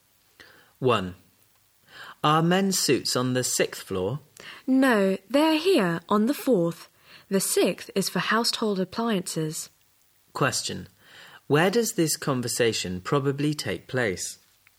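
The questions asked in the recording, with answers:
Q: Where does this conversation probably take place?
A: In a department store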